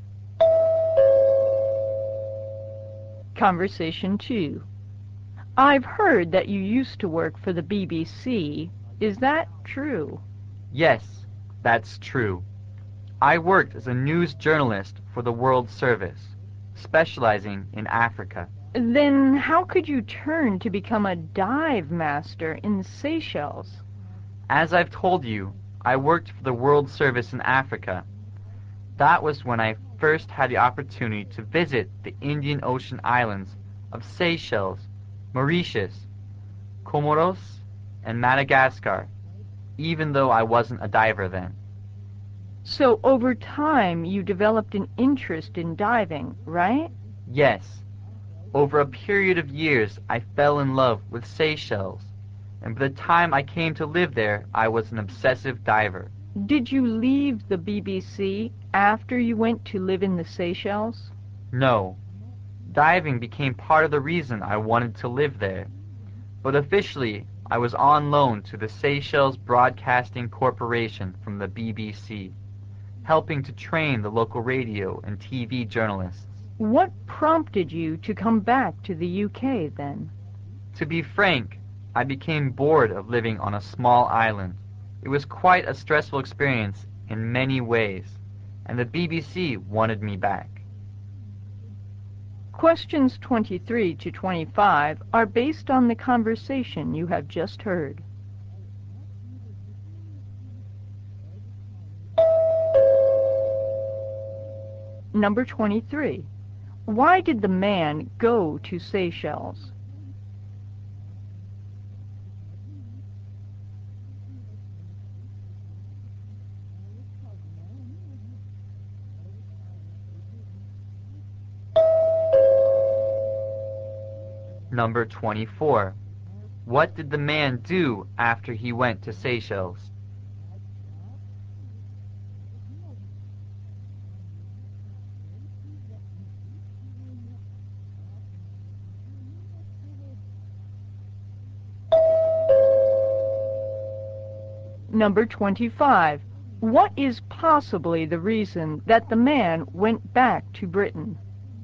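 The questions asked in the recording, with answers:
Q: What did the man do after he went to Seychelles?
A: He helped train local radio and TV journalists

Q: What is possibly the reason that the man went back to Britain?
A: He became bored of living on a small island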